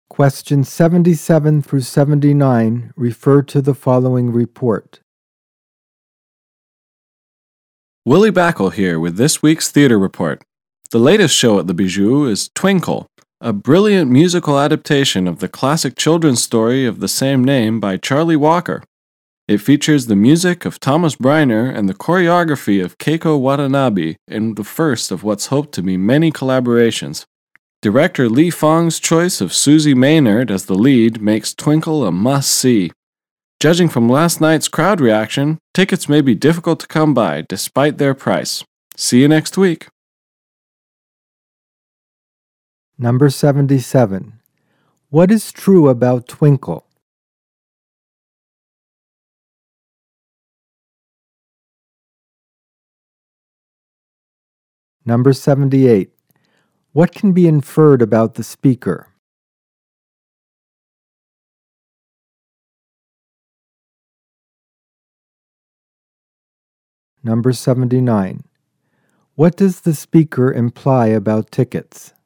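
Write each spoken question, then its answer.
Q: What is true about Twinkle?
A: It is a musical adaptation of a classic children's story

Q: What does the speaker imply about tickets?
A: They are expensive and may sell out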